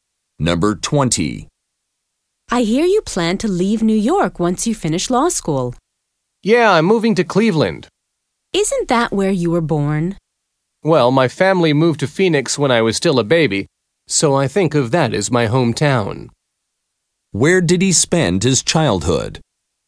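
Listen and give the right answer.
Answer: Phoenix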